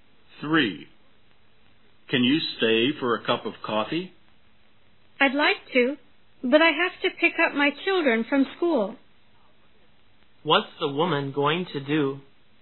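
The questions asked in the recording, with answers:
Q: What's the woman going to do?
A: Pick up her children from school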